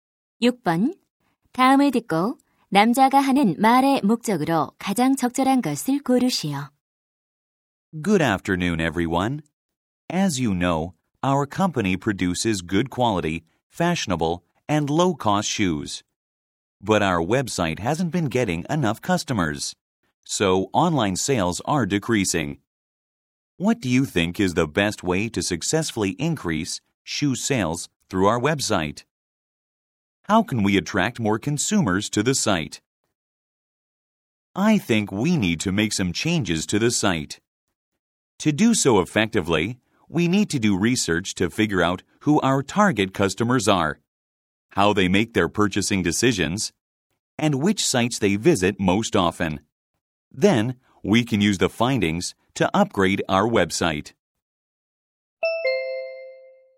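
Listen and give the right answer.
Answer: 웹사이트 개선을 위해 고객 조사를 제안하려고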